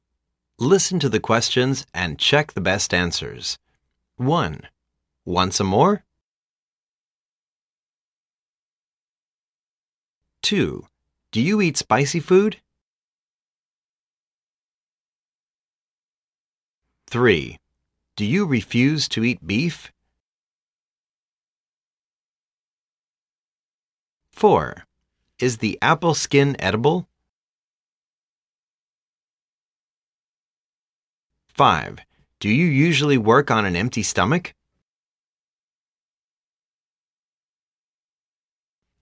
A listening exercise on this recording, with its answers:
Listen to the questions and check the best answers.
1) Want some more?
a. No. Thank you.I'm full.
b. No, l'm not.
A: a. No. Thank you.I'm full.

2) Do you eat spicy food?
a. No. lt's not spicy.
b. Yes. But not too spicy.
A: b. Yes. But not too spicy.

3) Do you refuse to eat beef?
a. Yes. I have beef.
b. Yes, due to my religious reasons.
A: b. Yes, due to my religious reasons.

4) Is the apple skin edible?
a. Yes. Wash it carefully and you can eat it.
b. Yes. You can peel the skin.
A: a. Yes. Wash it carefully and you can eat it.

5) Do you usually work on an empty stomach?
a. Yes. That's why I have a stomachache.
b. Yes.That's why I'm overweight.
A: a. Yes. That's why I have a stomachache.

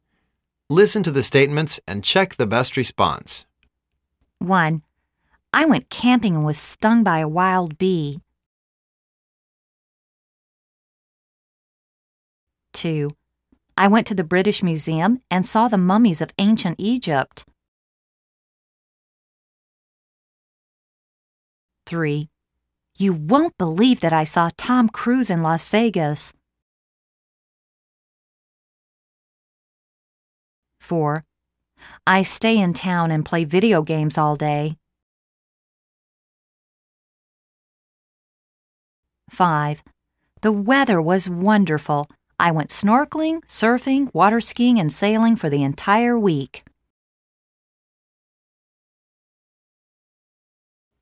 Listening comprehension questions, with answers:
Listen to the statements and check the best response.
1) I went camping and was stung by a wild bee.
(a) It sounds interesting.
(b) That's too bad.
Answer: (b) That's too bad.

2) I went to the British Museum and saw the Mummies of Ancient Egyptl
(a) Wow! That sounds interesting.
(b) I don't believe you had a good time there.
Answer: (a) Wow! That sounds interesting.

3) You won't believe that I saw Tom Cruise in Las Vegas.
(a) Really! Sounds like you had a great time in Las Vegas.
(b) You are not very lucky.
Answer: (a) Really! Sounds like you had a great time in Las Vegas.

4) I stay in town and play video games all day.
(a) It sounds you are very busy.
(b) Oh, it sounds very boring.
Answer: (b) Oh, it sounds very boring.

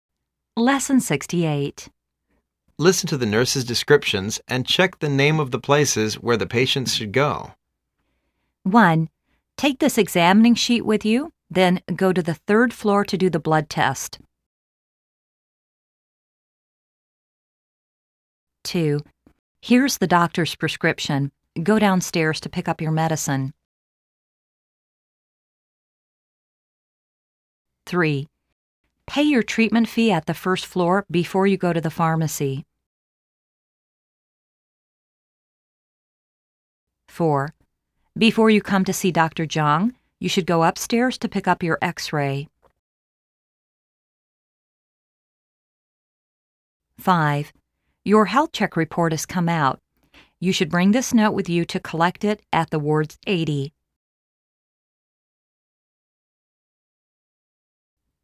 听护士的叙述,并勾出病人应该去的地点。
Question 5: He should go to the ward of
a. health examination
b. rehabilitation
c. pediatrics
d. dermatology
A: a. health examination

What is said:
Listen to the nurse's descriptions and check the name of the places where the patient should go.
1.Take this examining sheet with you. Then, go to the third floor to do the blood test.
2.Here's the doctor's prescription. Go downstairs to pick up your medicine.
3.Pay your treatment fee at the first floor before you go to the pharmacy.
4.Before you come to see Dr. You should go upstairs to pick up your X-ray.
5.Your health check report has come out. You should bring this note with you to collect it at the Ward 80.

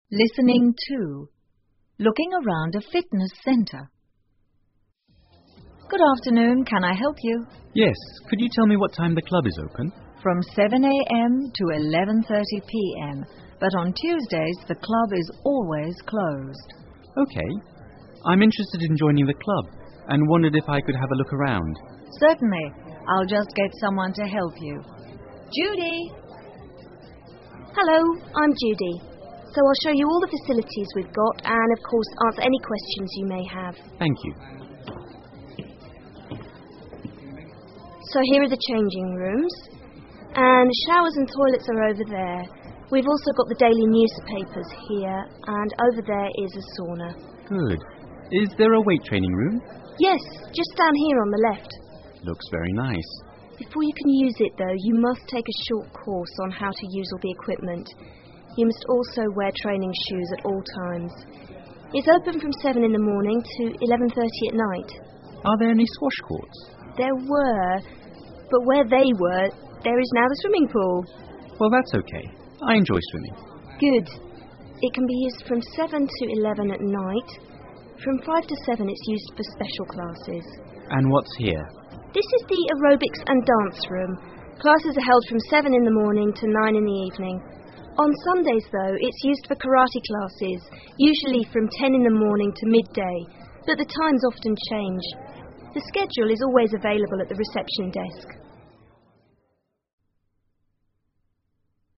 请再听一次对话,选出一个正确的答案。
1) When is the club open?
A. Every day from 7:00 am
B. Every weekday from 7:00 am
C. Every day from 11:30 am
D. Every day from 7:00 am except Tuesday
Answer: D. Every day from 7:00 am except Tuesday

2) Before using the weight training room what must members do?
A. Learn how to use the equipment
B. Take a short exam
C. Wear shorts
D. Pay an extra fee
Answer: A. Learn how to use the equipment

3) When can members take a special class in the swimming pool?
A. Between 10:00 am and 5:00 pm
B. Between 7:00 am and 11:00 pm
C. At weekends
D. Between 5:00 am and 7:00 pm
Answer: D. Between 5:00 am and 7:00 pm

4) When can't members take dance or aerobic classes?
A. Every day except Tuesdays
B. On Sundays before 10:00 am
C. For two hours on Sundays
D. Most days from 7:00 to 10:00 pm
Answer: C. For two hours on Sundays

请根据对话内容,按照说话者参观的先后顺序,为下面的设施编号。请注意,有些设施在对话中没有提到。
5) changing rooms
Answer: 1

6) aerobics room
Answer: 4

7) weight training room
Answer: 2

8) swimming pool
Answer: 3

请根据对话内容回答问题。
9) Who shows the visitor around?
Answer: Judy

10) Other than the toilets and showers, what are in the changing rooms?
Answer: Daily newspapers and a sauna

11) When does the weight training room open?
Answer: At 7:00 am

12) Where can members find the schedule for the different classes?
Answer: At the reception desk

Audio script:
Assistant: Good afternoon. Can I help you?
Visitor: Yes, could you tell me what time the club is open?
A:From 7:00 am to 11:30 pm, but on Tuesdays, the club is always closed.
V:OK.I'm interested in joining the club and wondered if I could have a look around.
A:Certainly.I'll just get someone to help you. Judy!
Judy: Hello. I'm Judy. So I'll show you all the facilities we've got and of course answer any questions you may have.
V:Thank you.
J:So,here are the changing rooms. And the showers and toilets are over there. We've also got the the daily newspapers here, and over there is a sauna.
V:Good.Is there a weight training room?
J:Yes,just down here on the left.
V:Looks very nice.
J:Before you can use it though, you must take a short course on how to use all the equipment. You must also wear training shoes at all times. It's open form 7:00 in the morning to 11:30 at night.
V:Are there any squash courts?
J:There were. But where they were, there is now the swimming pool.
V:Well,that's OK.I enjoy swimming.
J:Good.It can be used form 7 to 11 at night. From 8 to 7 it's used for special classes.
V:And what's here?
J:This is the aerobics and dance room. Classes are held from 7 in the morning to 9 in the evening. On Sundays though, it's used for karate classes, usually form 10 in the morning to midday, but the times often change. The schedule is always available at the reception desk.

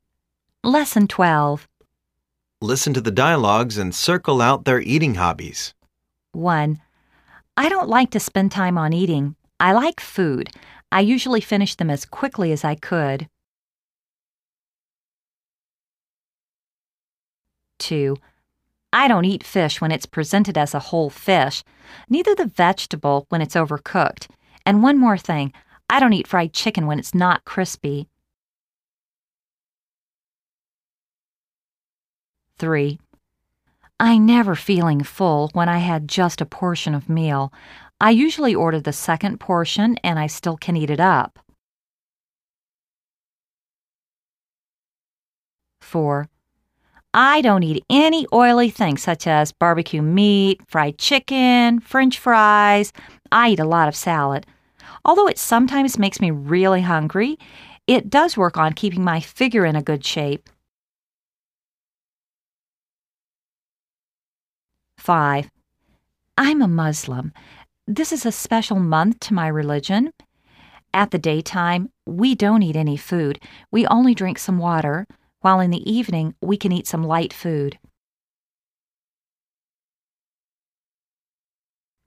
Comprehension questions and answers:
Listen to the dialogues and circle out their eating habits.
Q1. He usually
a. overeats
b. goes on a fast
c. eats up food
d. bolts down food.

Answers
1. d. bolts down food.

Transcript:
Listen to the dialogues and circle out their eating habbits.
1.I don't like to spend time on eating.I like food.I usually finish them as quickly as I could.
2.I don't eat fish when it's presented as a whole fish.Neither the vegetable when it's overcooked. And,one more thing, I don't eat fried chicken when it's not crispy.
3.l've never feeling full when I had just a portion of meal.I usually order the second portion and I still can eat it up!
4.I don't eat any oily things such as BBQ meat, fried chicken,French fries...I eat a lot of salad. Although it sometimes makes me really hungry, it does work on keeping my figure in a good shape.
5.l'm a Muslim. This is a special month to my religion.At the day time, we don't eat any food. We only drink some water.While in the evening, we can eat some light food.

